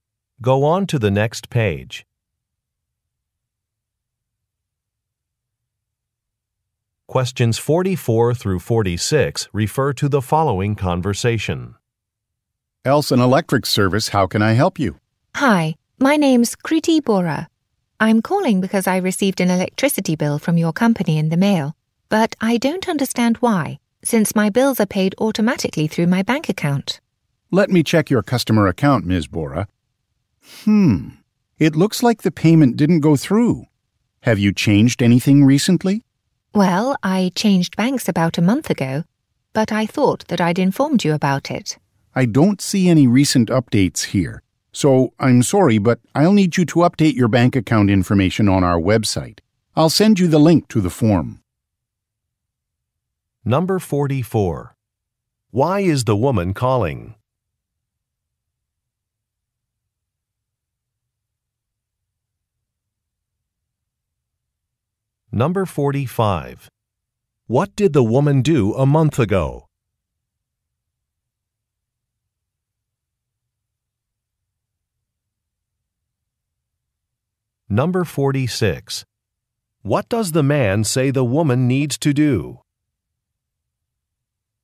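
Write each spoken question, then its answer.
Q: Why is the woman calling?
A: She got an electricity bill she doesn't understand

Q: What did the woman do a month ago?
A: She changed banks

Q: What does the man say the woman needs to do?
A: Update her bank account information on the website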